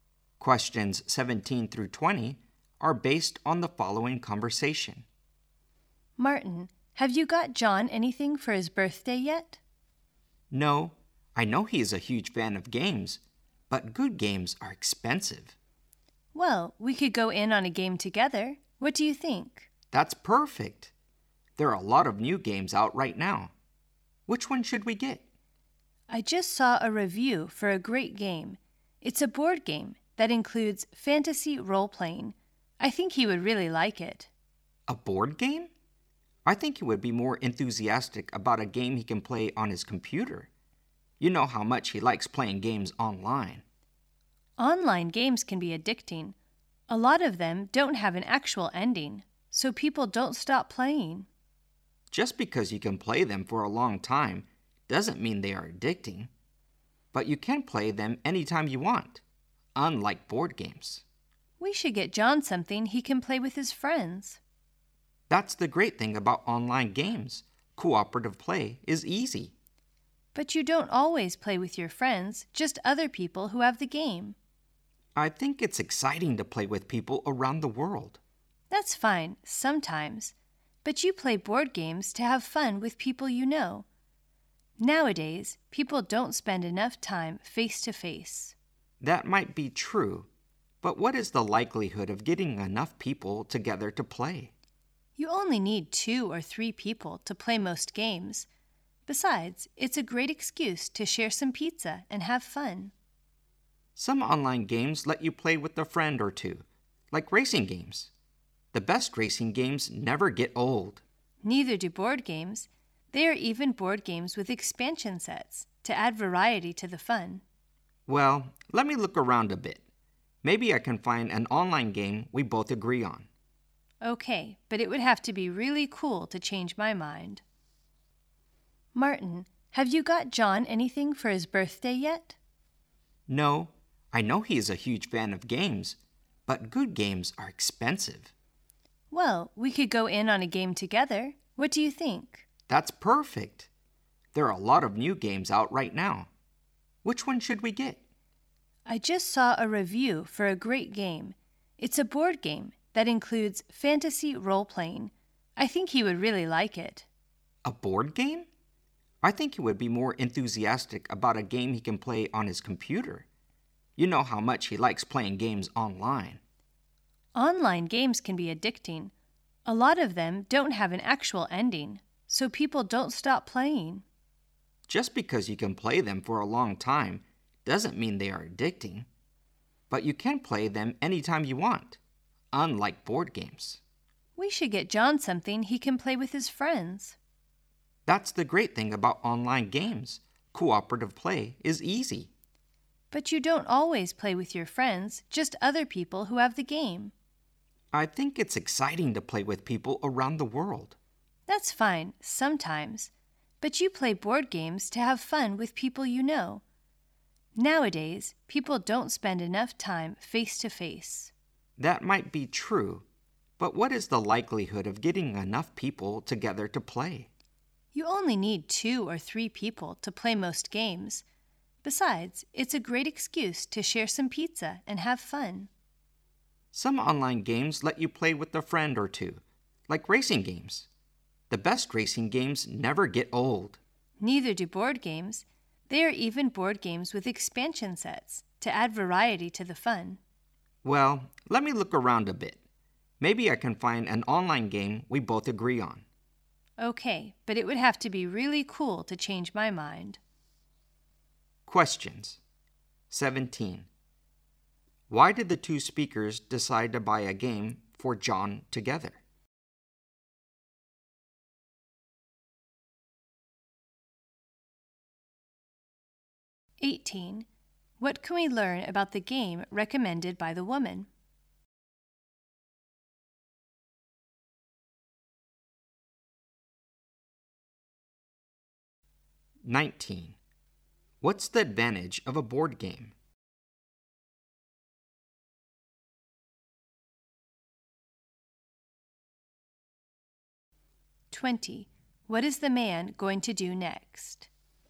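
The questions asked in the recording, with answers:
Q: Why did the two speakers decide to buy a game for John together?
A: Good games are expensive

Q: What can we learn about the game recommended by the woman?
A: It is a board game with fantasy role-playing

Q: What's the advantage of a board game?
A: You play face to face and have fun with people you know

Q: What is the man going to do next?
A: Look around for an online game they both agree on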